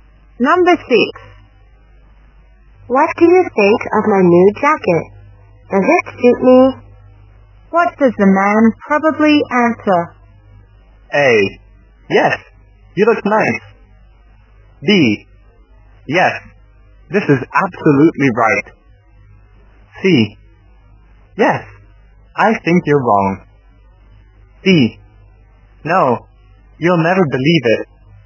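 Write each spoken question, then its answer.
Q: What does the man probably answer?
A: A: Yes, you look nice.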